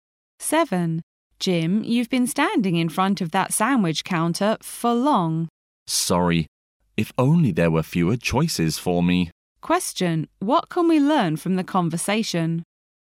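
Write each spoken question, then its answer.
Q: What can we learn from the conversation?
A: Jim can't decide which sandwich to choose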